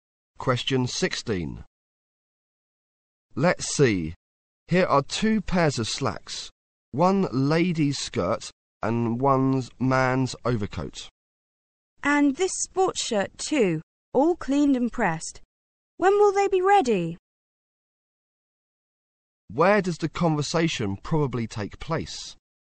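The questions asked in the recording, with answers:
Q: Where does the conversation probably take place?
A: At a dry cleaner's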